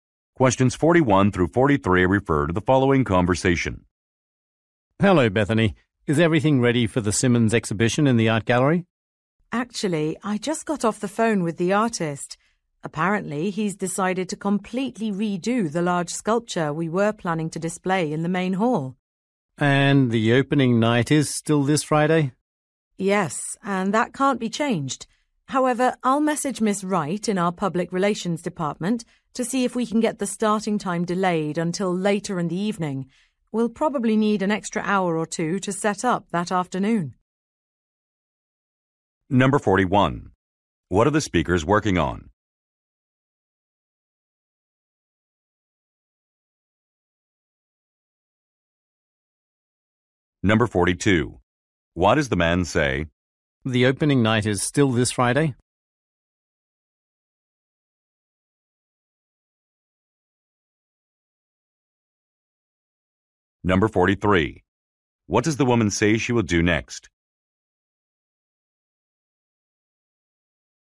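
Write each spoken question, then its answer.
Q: What are the speakers working on?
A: An art exhibition.

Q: What does the woman say she will do next?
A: Message public relations to ask about delaying the start time.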